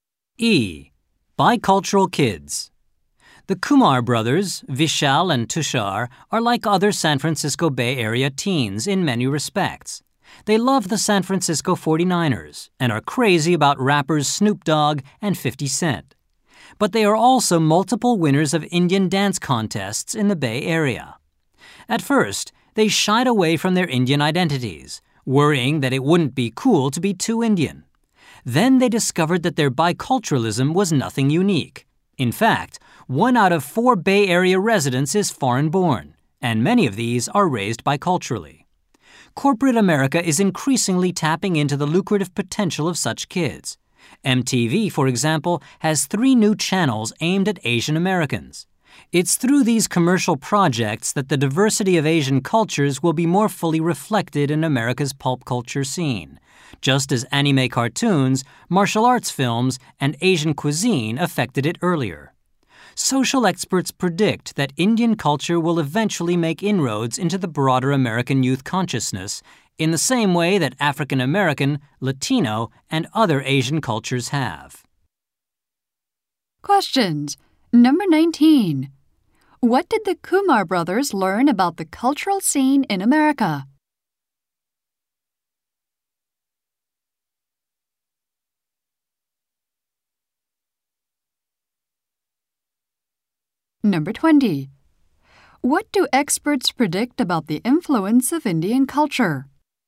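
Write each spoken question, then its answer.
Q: What did the Kumar brothers learn about the cultural scene in America?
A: Their biculturalism was nothing unique; many are raised biculturally

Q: What do experts predict about the influence of Indian culture?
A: It will eventually make inroads into broader American youth culture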